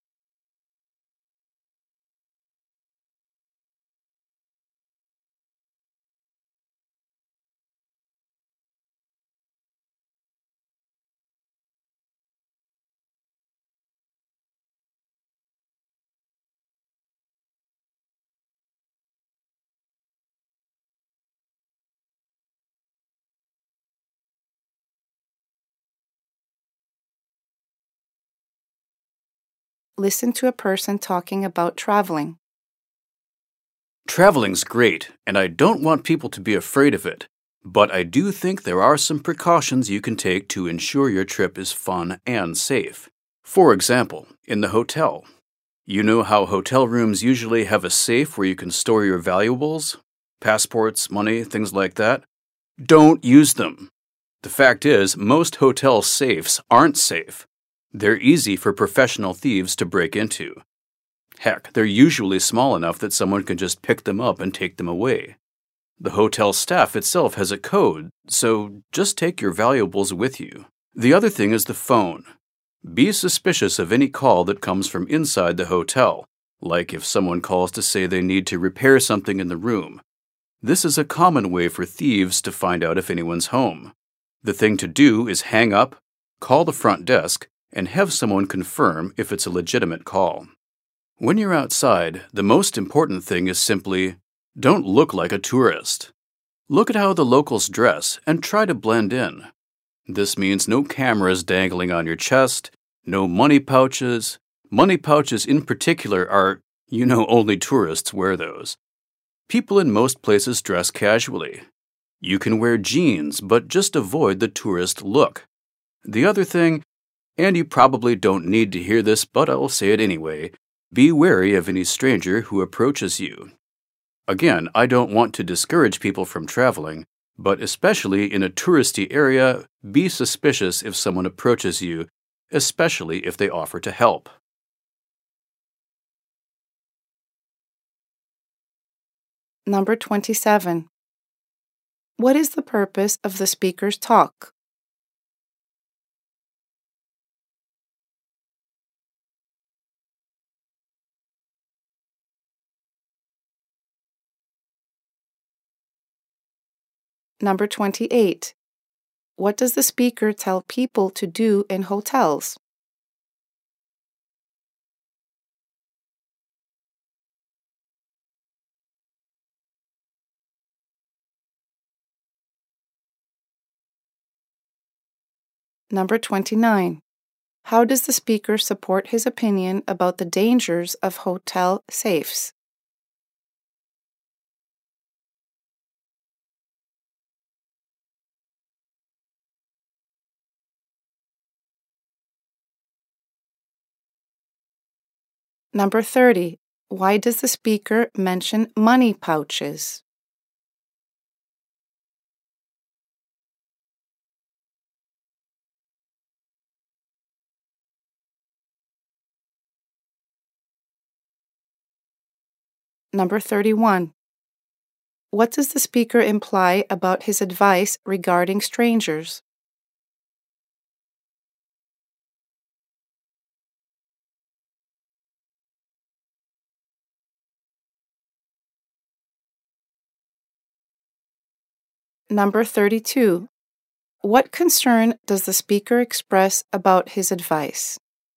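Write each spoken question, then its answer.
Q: What is the purpose of the speaker's talk?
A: To give safety precautions for traveling

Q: What does the speaker tell people to do in hotels?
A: Don't use the room safe; keep valuables with you and check in-hotel calls with the front desk

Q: How does the speaker support his opinion about the dangers of hotel safes?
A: They are easy to break into, small enough to carry away, and the staff has a code

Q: Why does the speaker mention money pouches?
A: As an example of something that makes you look like a tourist

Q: What does the speaker imply about his advice regarding strangers?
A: That it is obvious and listeners probably already know it

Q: What concern does the speaker express about his advice?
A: That it might discourage people from traveling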